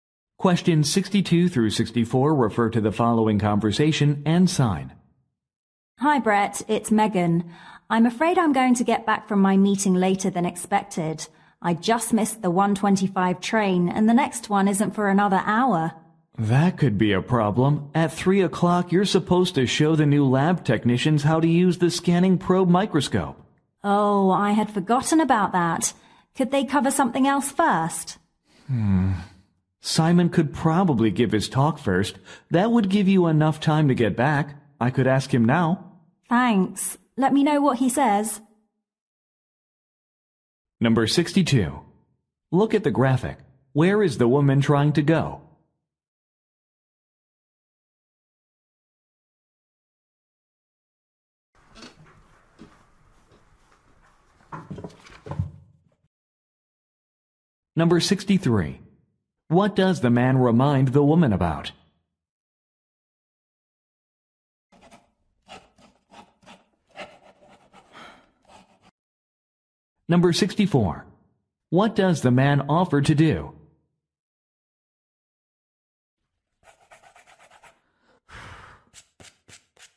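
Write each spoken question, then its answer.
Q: What does the man remind the woman about?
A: A microscope training for new lab technicians at 3

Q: What does the man offer to do?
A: Ask Simon to give his talk first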